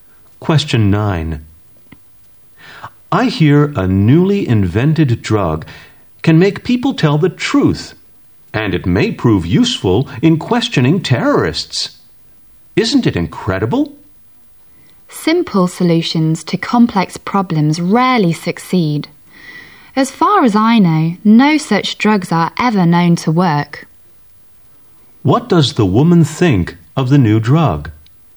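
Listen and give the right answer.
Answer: She doubts it will work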